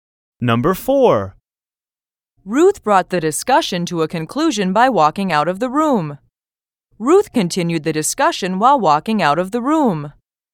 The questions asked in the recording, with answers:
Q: Ruth brought the discussion to a conclusion by walking out of the room. Ruth continued the discussion while walking out of the room.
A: Different is the correct answer.